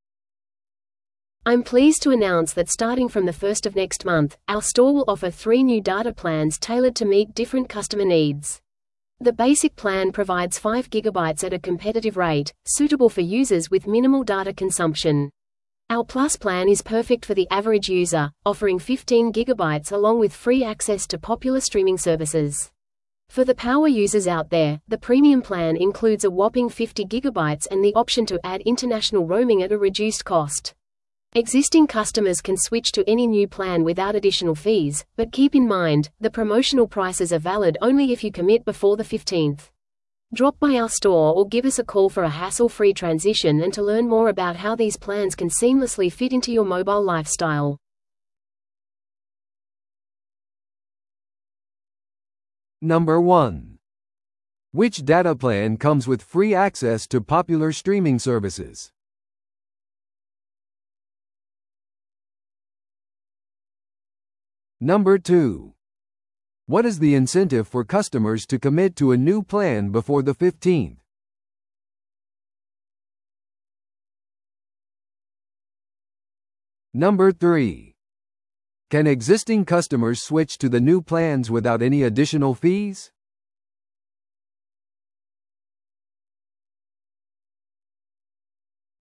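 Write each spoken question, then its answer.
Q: Which data plan comes with free access to popular streaming services?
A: The Plus plan

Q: What is the incentive for customers to commit to a new plan before the 15th?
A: They get the promotional prices

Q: Can existing customers switch to the new plans without any additional fees?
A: Yes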